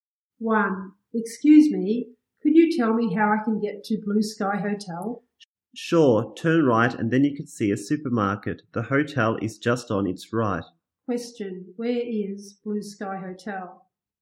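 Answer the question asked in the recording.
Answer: On the right of the supermarket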